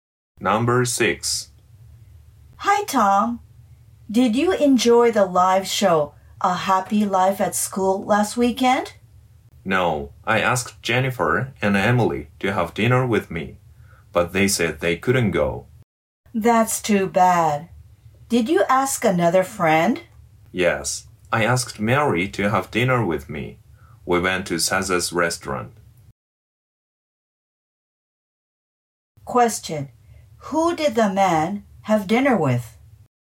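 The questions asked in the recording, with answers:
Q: Who did the man have dinner with?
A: Mary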